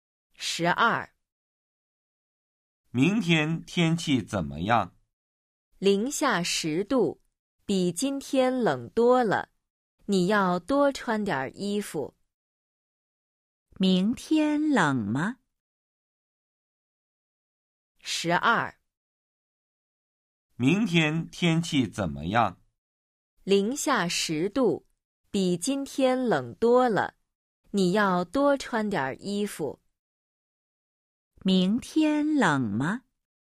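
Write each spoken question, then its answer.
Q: 明天冷吗?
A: 冷,零下十度,比今天冷多了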